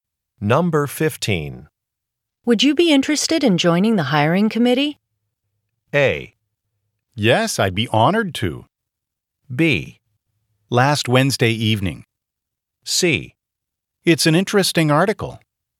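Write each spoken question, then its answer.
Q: Would you be interested in joining the hiring committee?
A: A: Yes, I'd be honored to.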